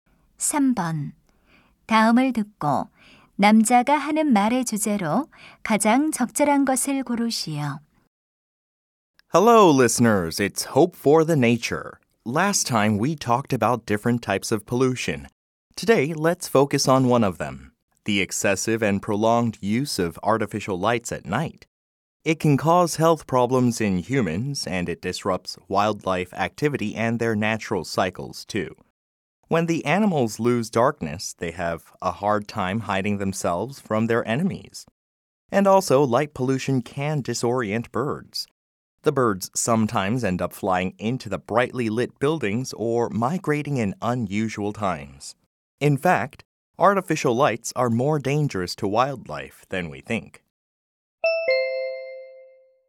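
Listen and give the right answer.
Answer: 빛 공해(야간 인공조명)가 야생동물에게 미치는 해로운 영향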